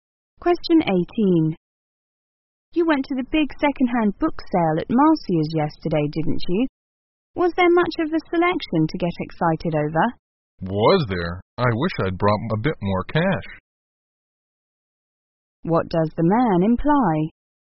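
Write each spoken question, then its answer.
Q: What does the man imply?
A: There was a great selection, and he wished he'd brought more money.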